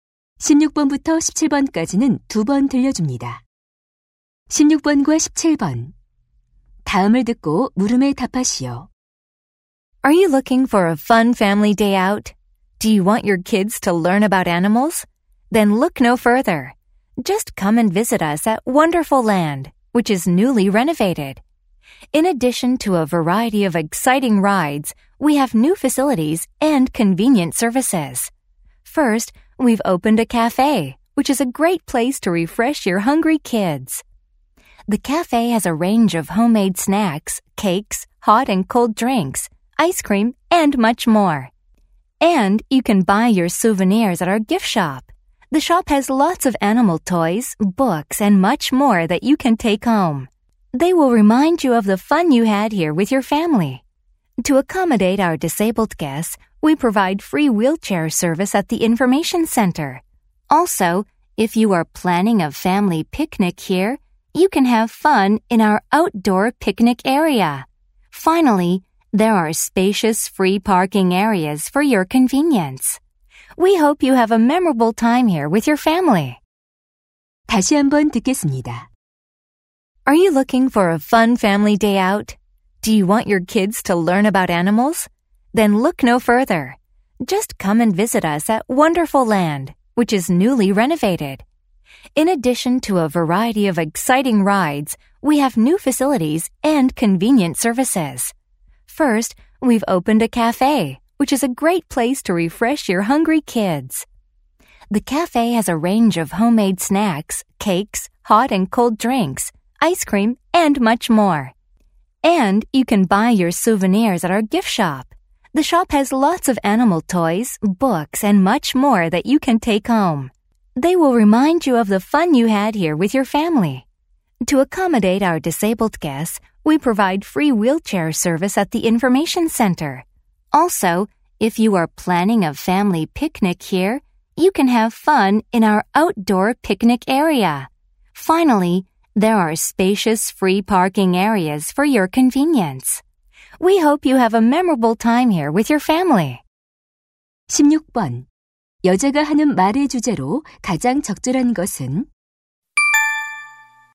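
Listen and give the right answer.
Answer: 새로 단장한 Wonderful Land의 새 시설과 서비스 홍보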